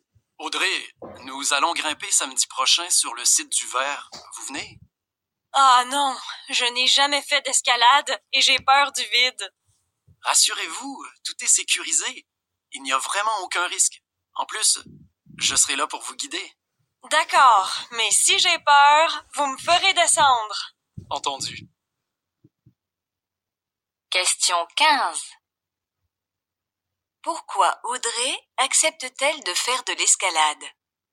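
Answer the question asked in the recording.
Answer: Parce que tout est sécurisé et qu'on la guidera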